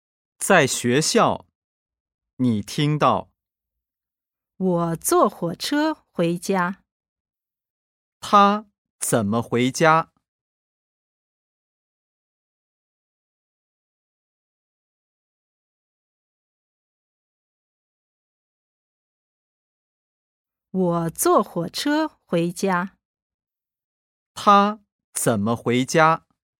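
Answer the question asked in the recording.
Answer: 坐火车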